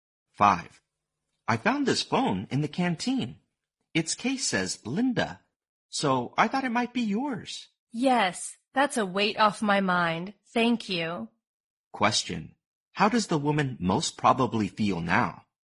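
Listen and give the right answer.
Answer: Relieved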